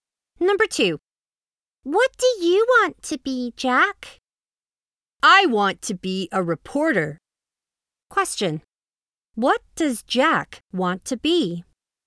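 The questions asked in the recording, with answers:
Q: What does Jack want to be?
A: A reporter.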